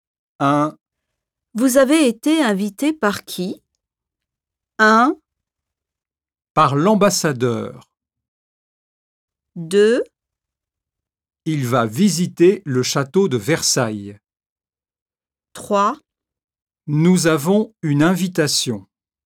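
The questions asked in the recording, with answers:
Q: Vous avez été invité par qui?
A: 1: Par l'ambassadeur.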